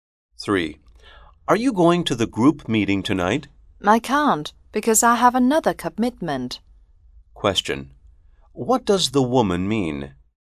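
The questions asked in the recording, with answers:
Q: What does the woman mean?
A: She can't go to the meeting because of another commitment.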